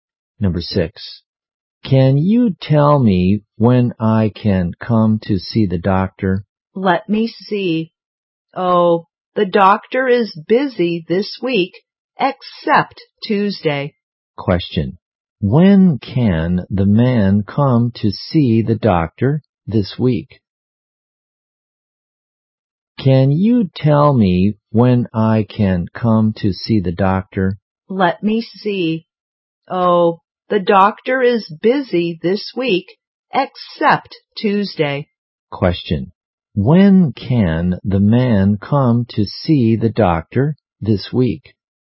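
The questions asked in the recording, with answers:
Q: When can the man come to see the doctor this week?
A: On Tuesday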